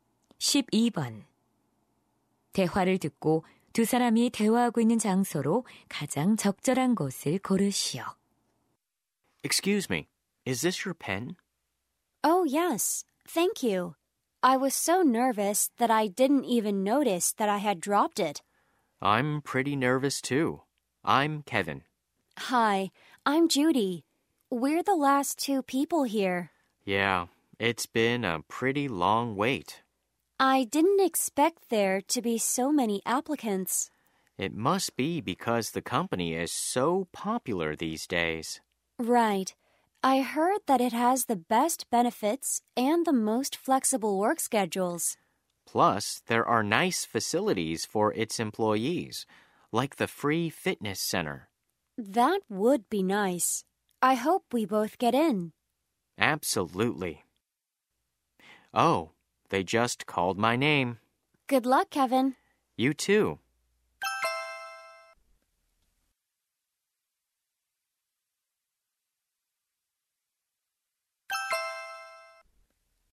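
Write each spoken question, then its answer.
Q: 대화를 듣고 두 사람이 대화하고 있는 장소로 가장 적절한 곳을 고르시오.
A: 회사 면접 대기실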